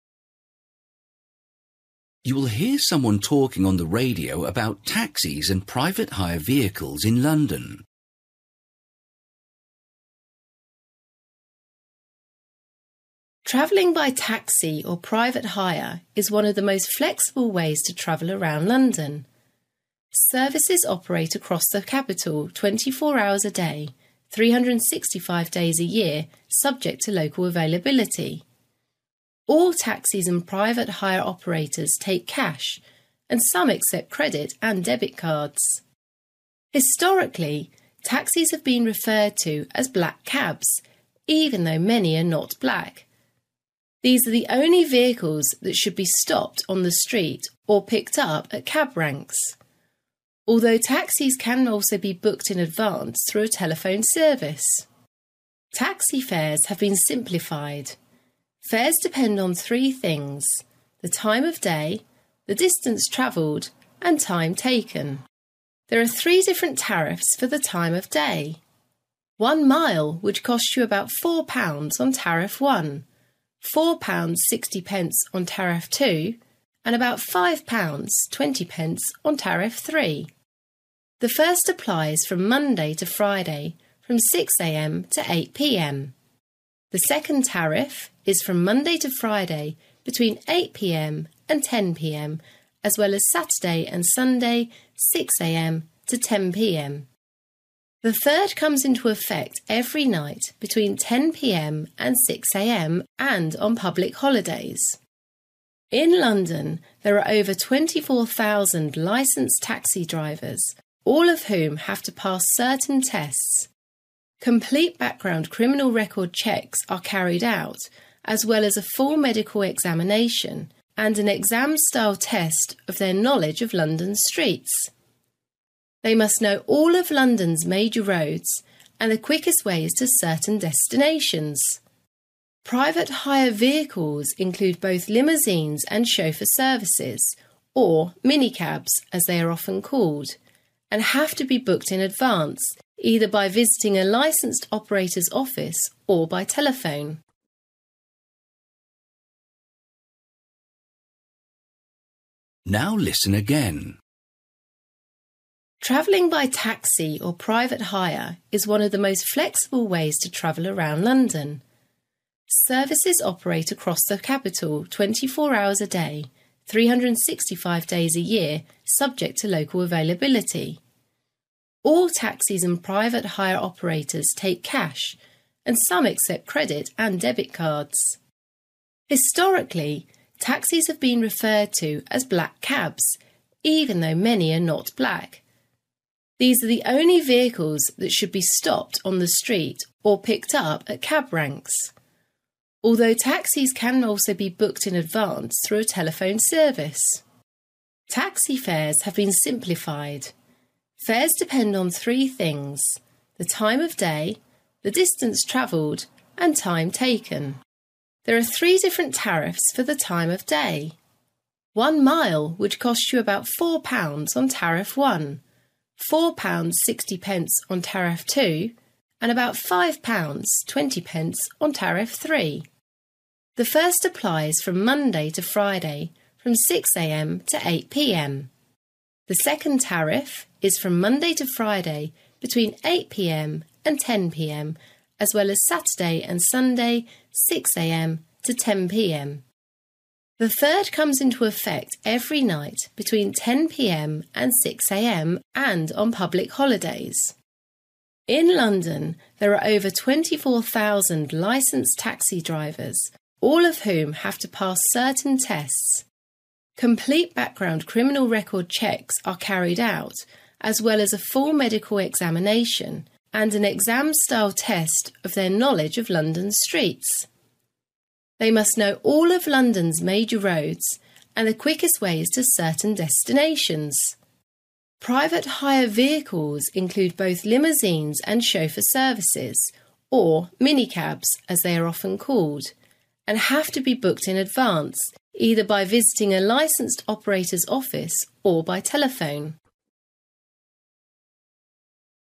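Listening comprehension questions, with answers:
For each question, write the correct answer in the gap. Write one or two words or a number or a date or a time. You will hear someone talking on the radio about taxis and private hire vehicles in London.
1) Methods of payment: (1) , or with credit and debit cards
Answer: cash

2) Where to stop a cab: in the (2) , or at cab ranks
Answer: street

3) (3) & : 6 am - 10 pm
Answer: Saturday & Sunday

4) Tariff 3: every night: 10 pm - 6 am & on (4)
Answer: public holidays

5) Requirements: taxi drivers to complete a (5) examination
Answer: full medical

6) Notice: Private hire vehicles must always be (6) either at an operator's office, or by phone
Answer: booked in advance

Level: Luyện nghe trình độ B1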